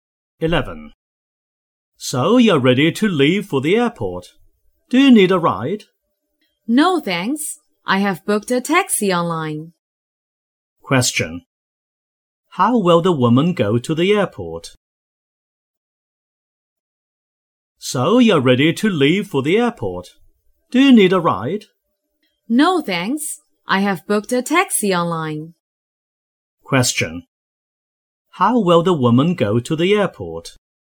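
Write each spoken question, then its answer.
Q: How will the woman go to the airport?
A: By taxi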